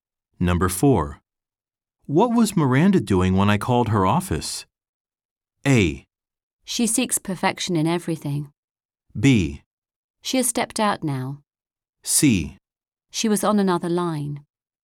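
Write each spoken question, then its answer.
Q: What was Miranda doing when I called her office?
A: C: She was on another line.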